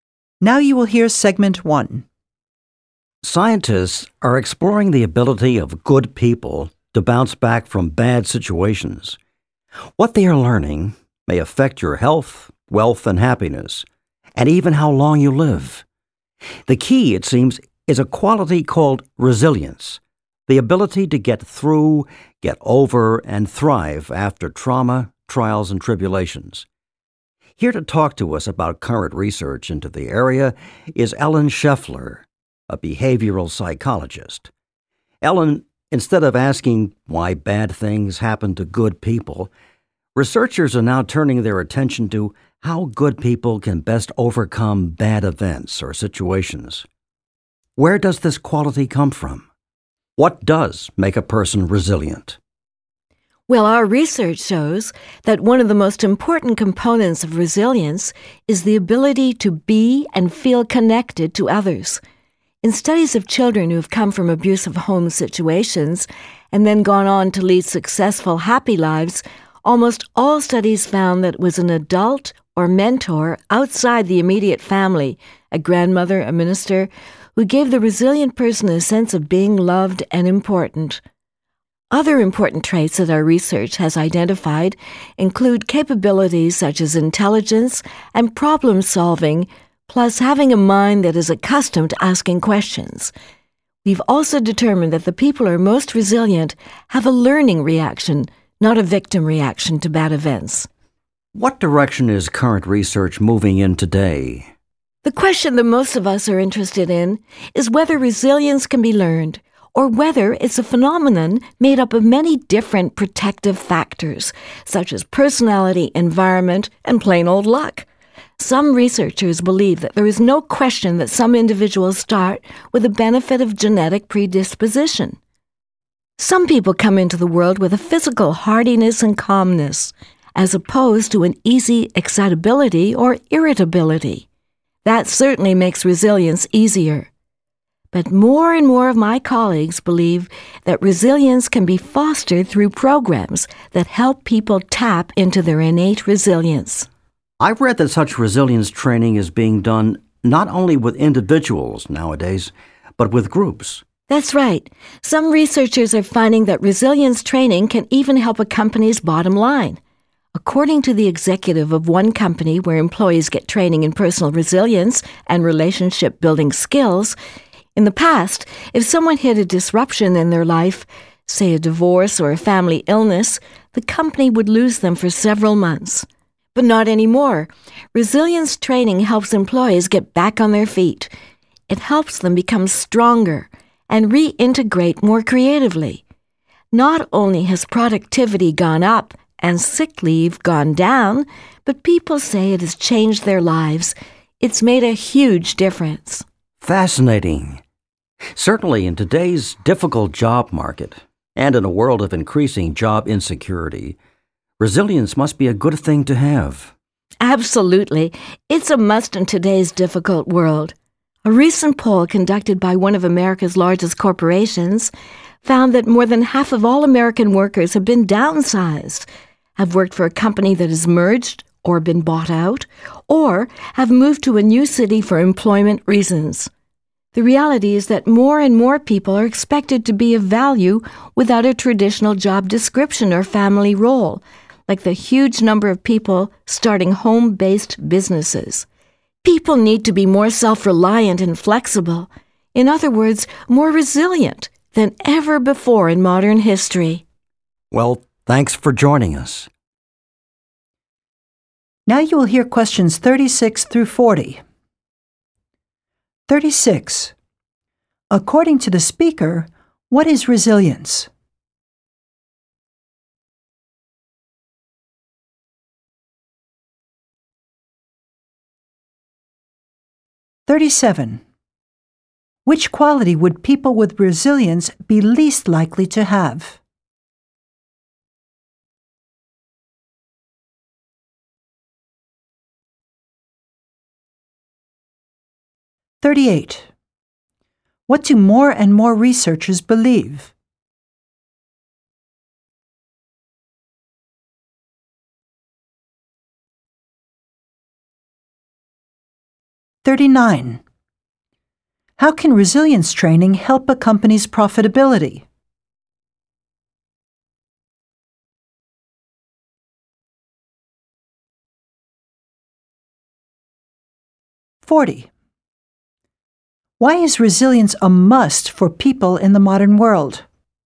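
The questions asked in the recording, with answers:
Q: According to the speaker, what is resilience?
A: The ability to get through, get over, and thrive after trauma, trials, and tribulations

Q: What do more and more researchers believe?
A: That resilience can be fostered through programs that help people tap into their innate resilience

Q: How can resilience training help a company's profitability?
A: It helps employees recover quickly from life disruptions, raising productivity and reducing sick leave

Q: Why is resilience a must for people in the modern world?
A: Because people must be more self-reliant and flexible amid job insecurity, downsizing, mergers and relocation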